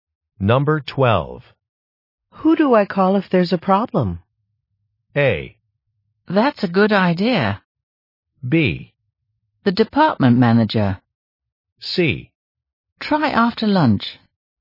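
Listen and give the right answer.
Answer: B: The department manager.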